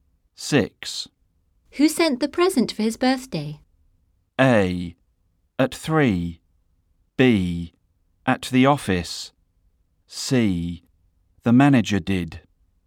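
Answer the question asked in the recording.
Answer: C: The manager did.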